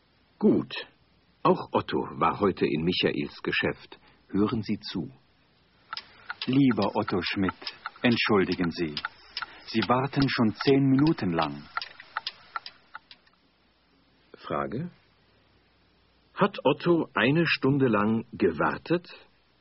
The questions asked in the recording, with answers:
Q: Hat Otto eine Stunde lang gewartet?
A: Nein, er hat nicht so lange gewartet.